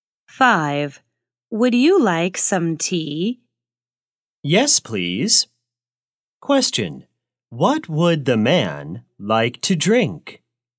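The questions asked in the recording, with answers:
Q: What would the man like to drink?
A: tea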